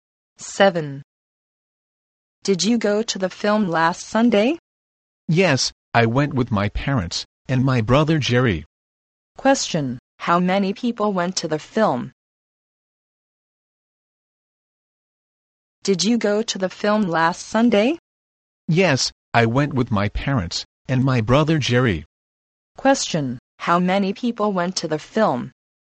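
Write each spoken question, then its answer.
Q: Question, how many people went to the film?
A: Four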